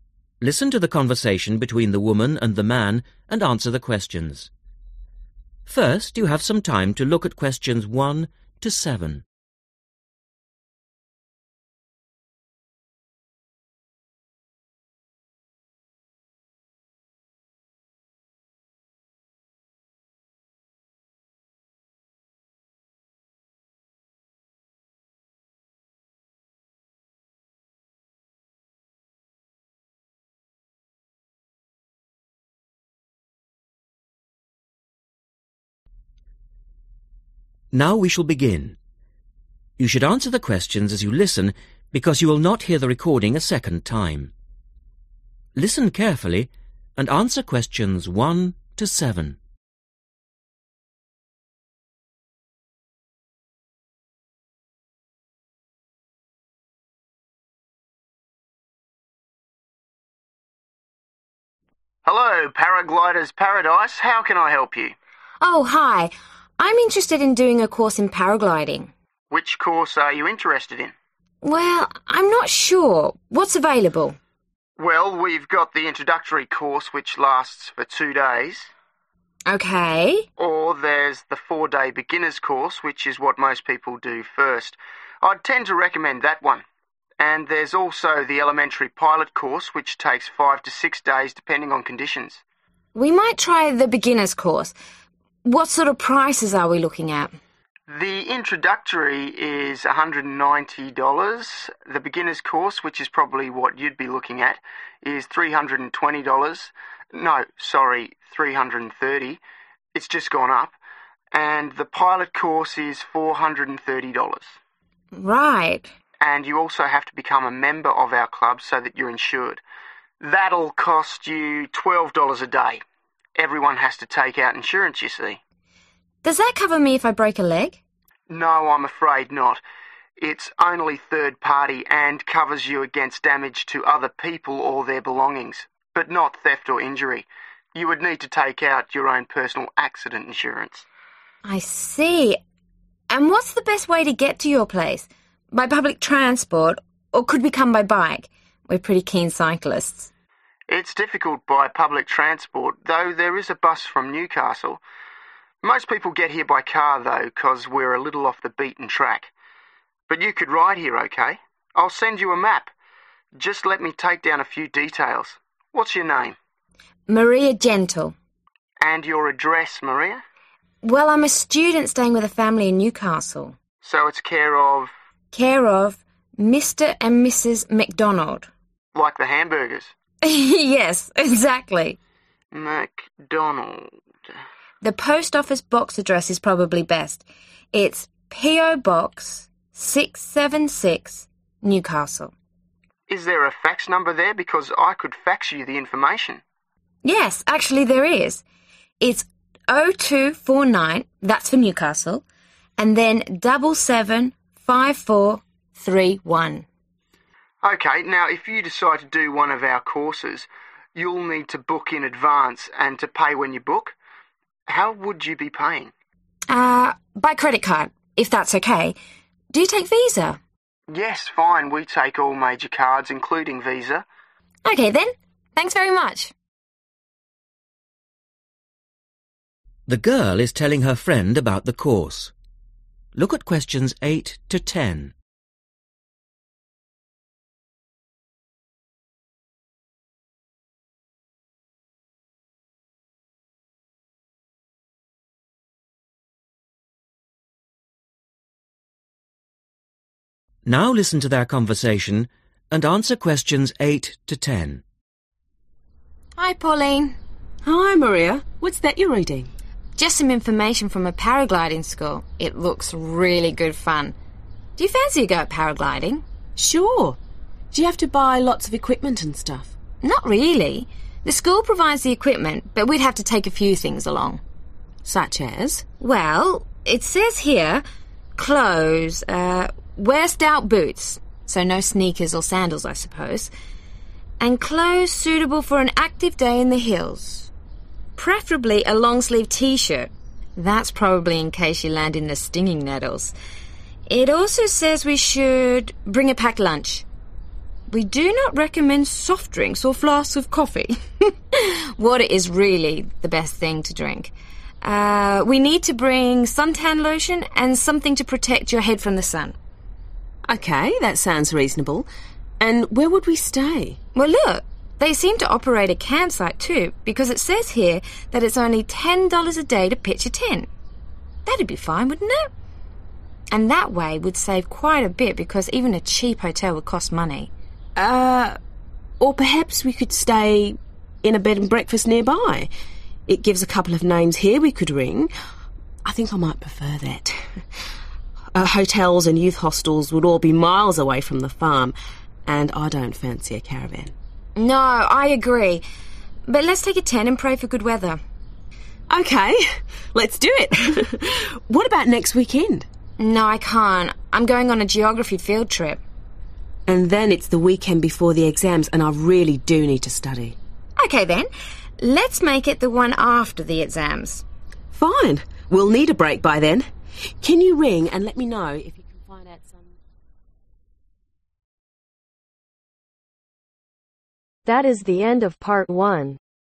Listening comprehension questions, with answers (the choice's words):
Circle the correct letters A-D.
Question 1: How much is the beginner's course ?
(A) $ 190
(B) $320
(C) $330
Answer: $330

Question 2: What does the club insurance cover ?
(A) injury to yourself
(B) injury to your equipment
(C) damage to other people's property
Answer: damage to other people's property

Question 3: How do the girl want to travel ?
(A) public transport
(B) private bus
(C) bicycle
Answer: bicycle

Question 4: Address : C/o Mr. & Mrs. (4)............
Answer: McDonald/Macdonald/MacDonald

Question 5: (5)............ Newcastle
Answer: Post Office Box/PO Box 676

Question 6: Fax no. 0249 (6)............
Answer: 775431

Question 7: Type of Card : (7)............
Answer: Credit card/Visa

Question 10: Which weekend do the girls decide to go ?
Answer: After (the) exams